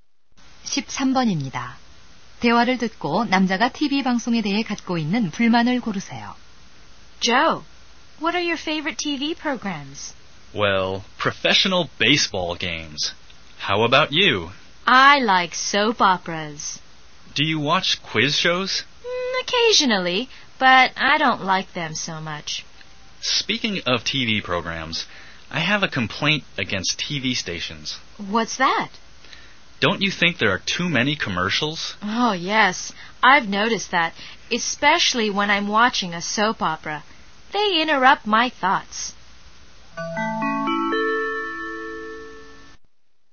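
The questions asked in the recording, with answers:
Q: 대화를 듣고 남자가 TV 방송에 대해 갖고 있는 불만을 고르세요.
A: 광고가 너무 많다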